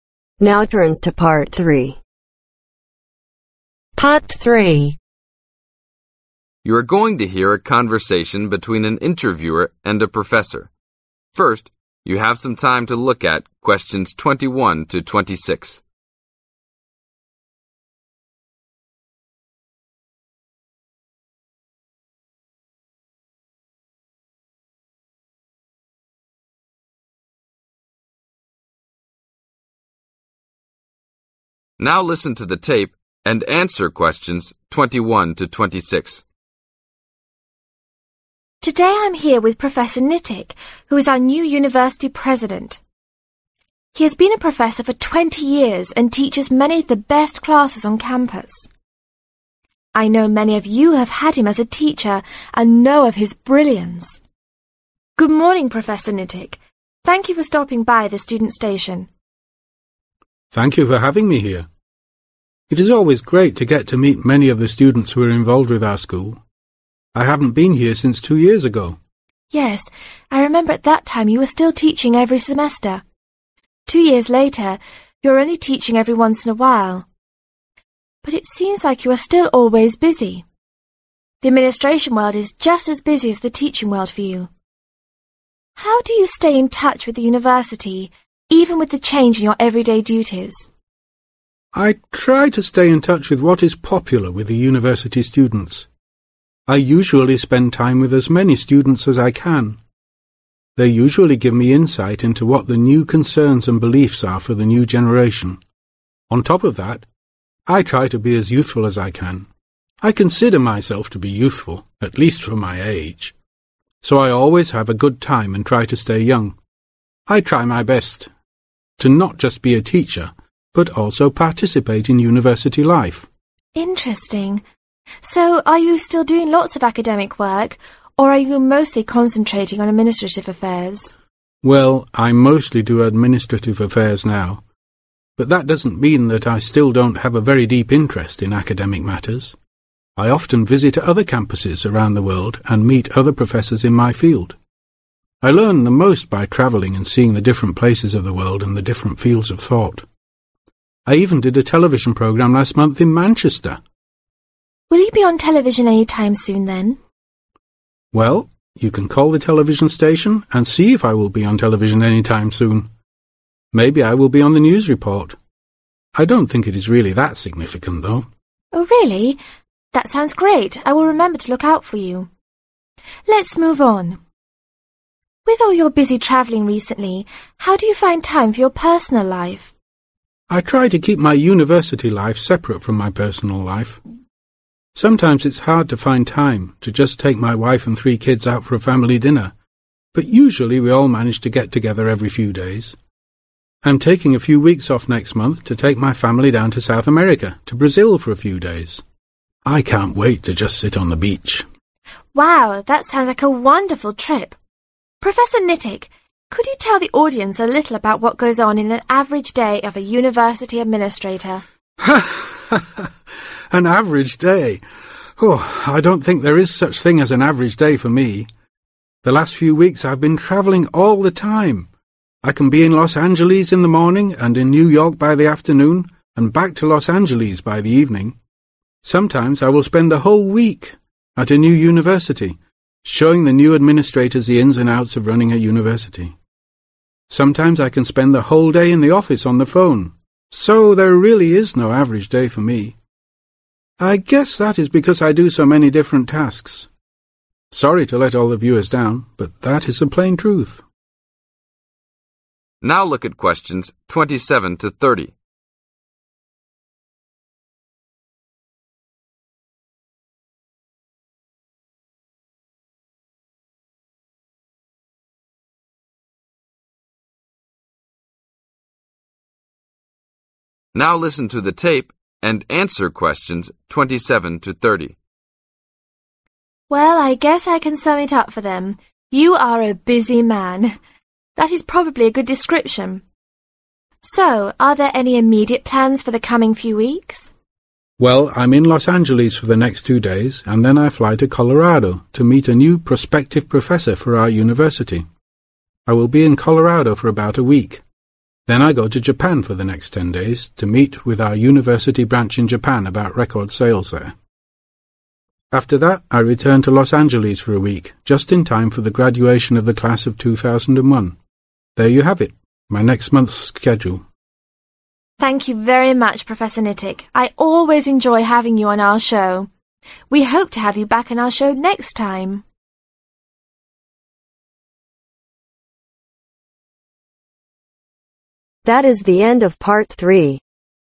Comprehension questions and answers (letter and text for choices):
Circle the THREE answers that apply.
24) Where does Professor Nitik learn the most ?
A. reading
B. traveling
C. talking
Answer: B. traveling

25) Name the country where Professor Nitik is taking his family for a vacation next month. In South America, the country of ............ .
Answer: Brazil

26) Why does Professor Nitik say that he cannot describe an average day for him ?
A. He doesn't like planning things.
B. He doesn't know what he usually does.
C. He does many different tasks.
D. He likes not having to do routine things.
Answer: C. He does many different tasks.

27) in Los Angeles for next ............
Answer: 2 Days

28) Fly to Colorado for about a ............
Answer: Week

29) Go to Japan for next ............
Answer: 10 Days

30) Return to Los Angeles for ............ class 2001 a week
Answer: Graduation